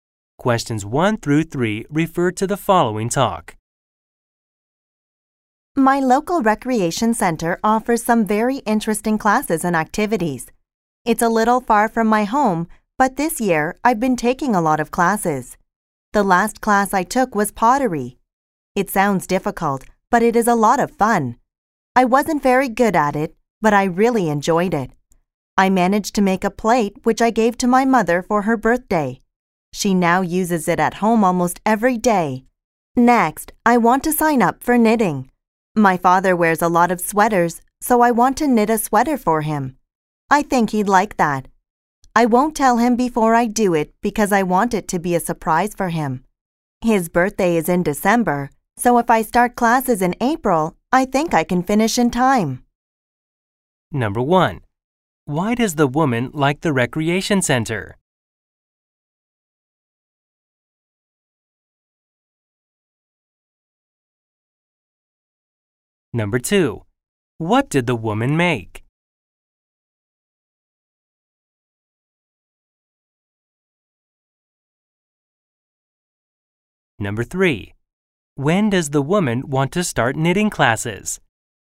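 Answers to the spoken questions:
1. It offers very interesting classes and activities.
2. A plate
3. In April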